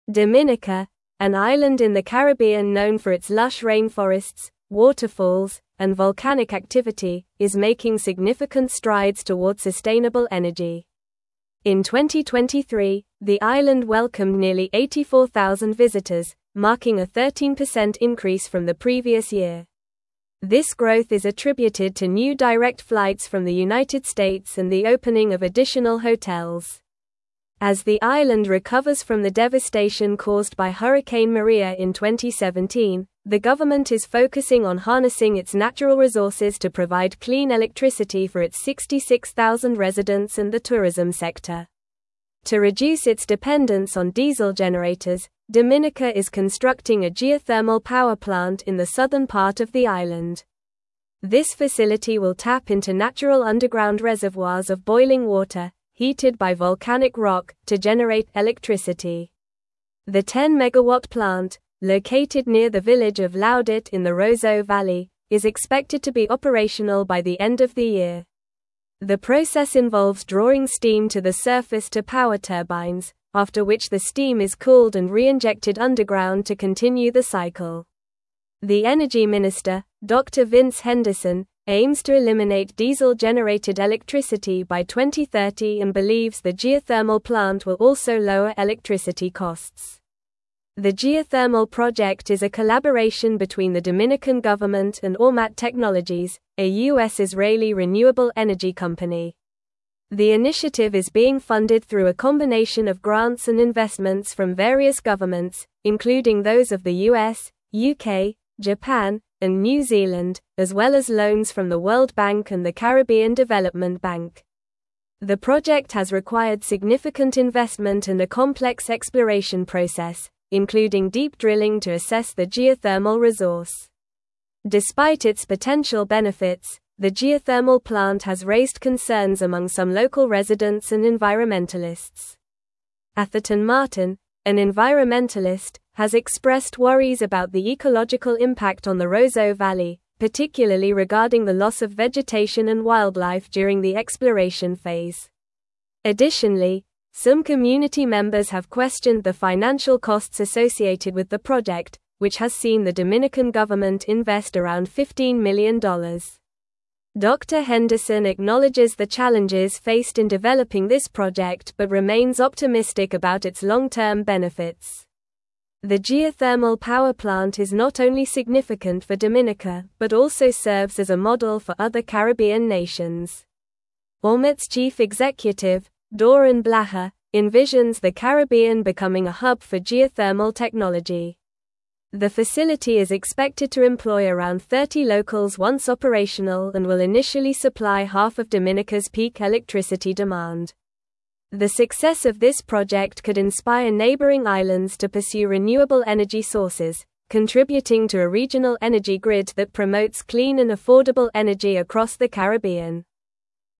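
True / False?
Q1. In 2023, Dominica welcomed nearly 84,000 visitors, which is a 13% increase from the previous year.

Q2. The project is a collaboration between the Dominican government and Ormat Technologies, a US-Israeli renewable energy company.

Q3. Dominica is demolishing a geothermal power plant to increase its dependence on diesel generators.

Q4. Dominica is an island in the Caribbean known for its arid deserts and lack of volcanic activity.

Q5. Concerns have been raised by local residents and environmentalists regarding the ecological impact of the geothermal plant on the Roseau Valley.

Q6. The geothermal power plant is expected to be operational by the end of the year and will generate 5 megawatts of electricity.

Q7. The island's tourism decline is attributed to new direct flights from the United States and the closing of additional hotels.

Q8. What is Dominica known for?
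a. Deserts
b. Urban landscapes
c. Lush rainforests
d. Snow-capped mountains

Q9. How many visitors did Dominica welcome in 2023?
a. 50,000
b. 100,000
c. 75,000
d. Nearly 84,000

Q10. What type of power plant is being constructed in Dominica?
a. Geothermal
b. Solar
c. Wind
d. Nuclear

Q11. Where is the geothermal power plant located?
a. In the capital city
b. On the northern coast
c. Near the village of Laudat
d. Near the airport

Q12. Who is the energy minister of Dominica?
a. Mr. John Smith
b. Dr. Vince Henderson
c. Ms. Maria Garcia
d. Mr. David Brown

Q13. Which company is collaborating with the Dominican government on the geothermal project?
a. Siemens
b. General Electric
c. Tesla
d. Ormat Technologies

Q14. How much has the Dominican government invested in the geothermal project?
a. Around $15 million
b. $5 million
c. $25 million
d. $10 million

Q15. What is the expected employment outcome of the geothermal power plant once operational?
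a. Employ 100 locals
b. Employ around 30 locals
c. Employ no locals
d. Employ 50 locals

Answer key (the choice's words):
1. True
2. True
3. False
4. False
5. True
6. False
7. False
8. Lush rainforests
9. Nearly 84,000
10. Geothermal
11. Near the village of Laudat
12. Dr. Vince Henderson
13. Ormat Technologies
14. Around $15 million
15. Employ around 30 locals

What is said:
Dominica, an island in the Caribbean known for its lush rainforests, waterfalls, and volcanic activity, is making significant strides toward sustainable energy. In 2023, the island welcomed nearly 84,000 visitors, marking a 13% increase from the previous year. This growth is attributed to new direct flights from the United States and the opening of additional hotels. As the island recovers from the devastation caused by Hurricane Maria in 2017, the government is focusing on harnessing its natural resources to provide clean electricity for its 66,000 residents and the tourism sector.
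To reduce its dependence on diesel generators, Dominica is constructing a geothermal power plant in the southern part of the island. This facility will tap into natural underground reservoirs of boiling water, heated by volcanic rock, to generate electricity. The 10-megawatt plant, located near the village of Laudat in the Roseau Valley, is expected to be operational by the end of the year. The process involves drawing steam to the surface to power turbines, after which the steam is cooled and reinjected underground to continue the cycle. The energy minister, Dr. Vince Henderson, aims to eliminate diesel-generated electricity by 2030 and believes the geothermal plant will also lower electricity costs.
The geothermal project is a collaboration between the Dominican government and Ormat Technologies, a US-Israeli renewable energy company. The initiative is being funded through a combination of grants and investments from various governments, including those of the US, UK, Japan, and New Zealand, as well as loans from the World Bank and the Caribbean Development Bank. 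The project has required significant investment and a complex exploration process, including deep drilling to assess the geothermal resource.
Despite its potential benefits, the geothermal plant has raised concerns among some local residents and environmentalists. Atherton Martin, an environmentalist, has expressed worries about the ecological impact on the Roseau Valley, particularly regarding the loss of vegetation and wildlife during the exploration phase. Additionally, some community members have questioned the financial costs associated with the project, which has seen the Dominican government invest around $15 million. Dr. Henderson acknowledges the challenges faced in developing this project but remains optimistic about its long-term benefits.
The geothermal power plant is not only significant for Dominica but also serves as a model for other Caribbean nations. Ormat's chief executive, Doron Blachar, envisions the Caribbean becoming a hub for geothermal technology. 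The facility is expected to employ around 30 locals once operational and will initially supply half of Dominica's peak electricity demand. The success of this project could inspire neighboring islands to pursue renewable energy sources, contributing to a regional energy grid that promotes clean and affordable energy across the Caribbean.
1. What factors contributed to the increase in visitors to Dominica in 2023?
Show model answerThe success of Dominica's geothermal project could inspire neighboring islands to pursue renewable energy sources, contributing to a regional energy grid that promotes clean and affordable energy across the Caribbean.
renewable energy sources, contributing to a regional energy grid that promotes clean and affordable energy across the Caribbean.

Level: Level 4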